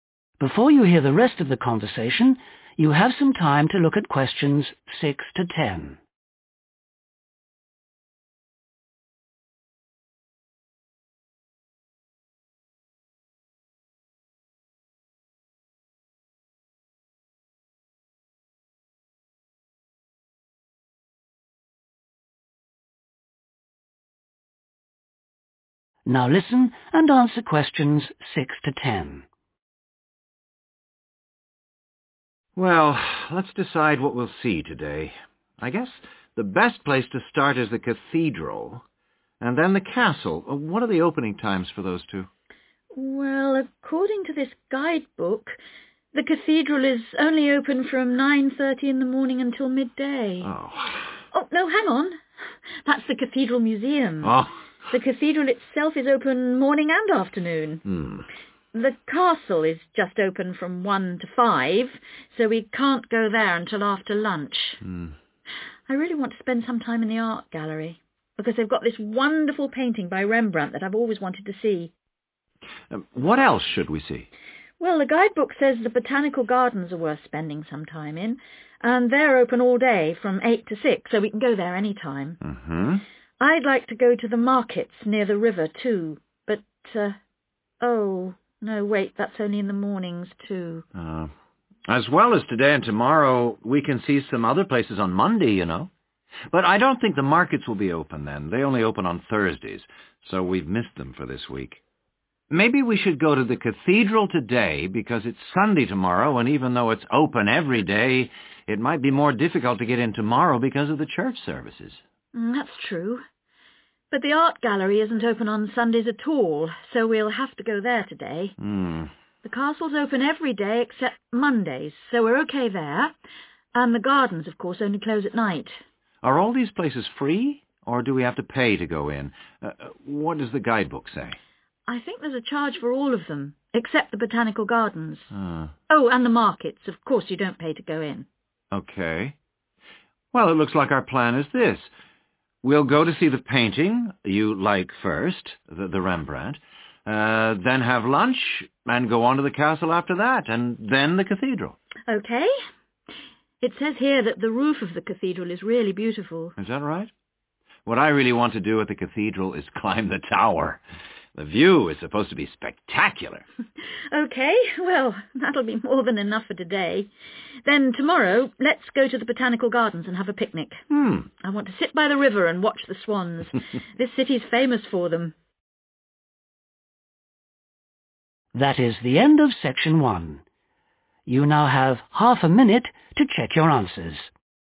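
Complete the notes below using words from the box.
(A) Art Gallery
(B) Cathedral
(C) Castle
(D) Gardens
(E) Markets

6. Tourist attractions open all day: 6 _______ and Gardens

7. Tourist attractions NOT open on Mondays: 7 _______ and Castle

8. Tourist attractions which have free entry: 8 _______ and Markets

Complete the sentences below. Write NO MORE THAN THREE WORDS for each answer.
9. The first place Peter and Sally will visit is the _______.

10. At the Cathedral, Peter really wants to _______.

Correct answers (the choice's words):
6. Cathedral
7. Markets
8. Gardens
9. art gallery
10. climb the tower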